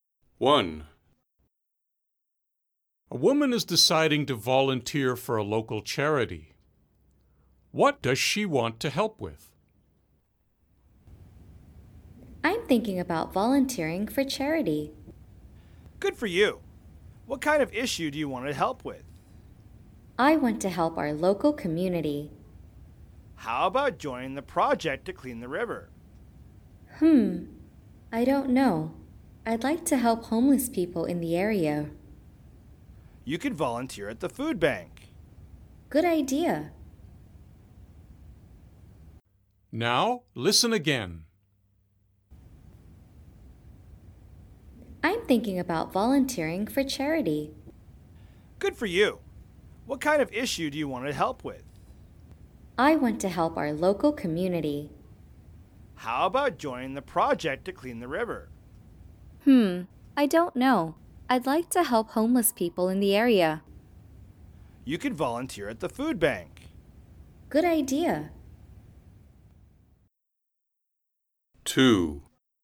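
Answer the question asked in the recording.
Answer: Helping homeless people in the area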